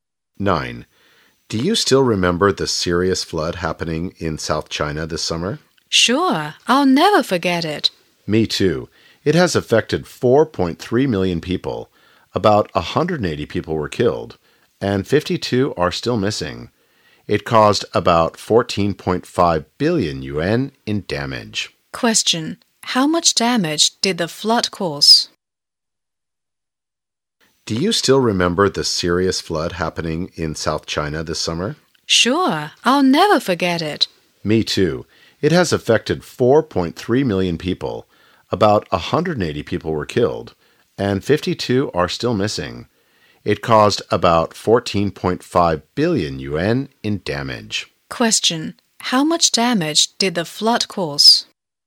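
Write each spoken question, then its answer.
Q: How much damage did the flood cause?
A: About 14.5 billion yuan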